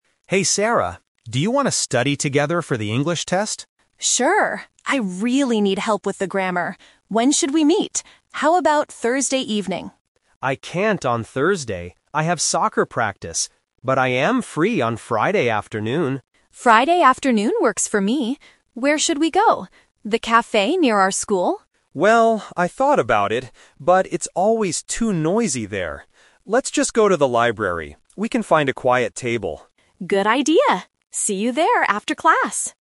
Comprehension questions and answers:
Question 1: Why are Mark and Sarah meeting?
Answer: To study for an English test.

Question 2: When did they agree to meet?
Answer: Friday afternoon.

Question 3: Where are they going to study?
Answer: At the library.

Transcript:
Mark: Hey Sarah, do you want to study together for the English test?
Sarah: Sure! I really need help with the grammar. When should we meet? How about Thursday evening?
Mark: I can't on Thursday. I have soccer practice. But I am free on Friday afternoon.
Sarah: Friday afternoon works for me. Where should we go? The cafe near our school?
Mark: Well, I thought about it, but it's always too noisy there. Let's just go to the library. We can find a quiet table.